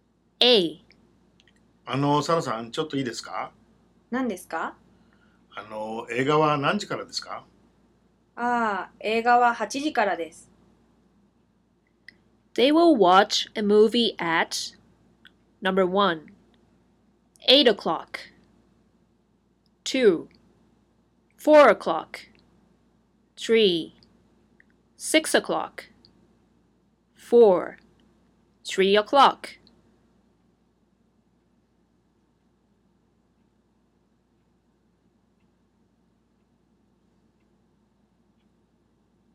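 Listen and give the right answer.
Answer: 1: 8 o'clock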